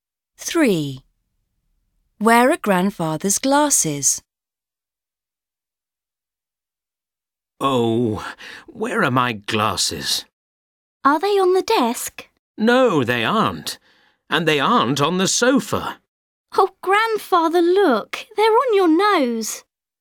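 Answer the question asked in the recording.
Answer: On his nose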